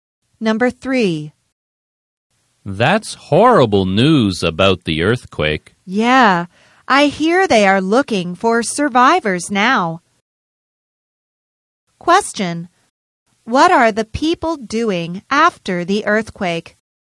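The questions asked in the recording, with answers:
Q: What are the people doing after the earthquake?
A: Looking for survivors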